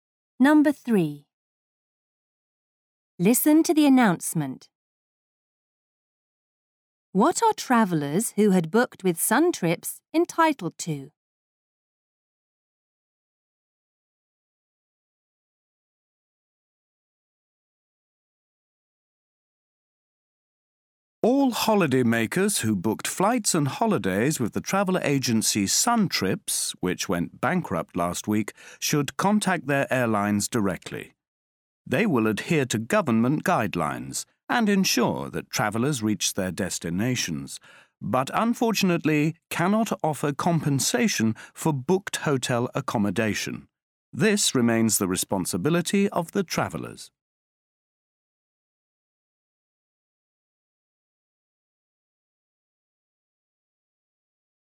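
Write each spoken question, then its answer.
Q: What are travellers who had booked with Sun Trips entitled to?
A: Being flown to their destinations by the airlines, but no compensation for hotel accommodation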